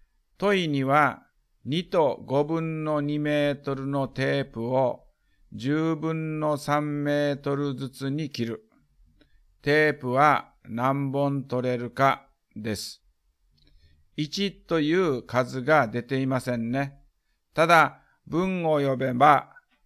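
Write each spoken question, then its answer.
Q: 問には、2と5分の2メートルのテープを10分の3メートルずつに切る。テープは何本取れるかです。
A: 8本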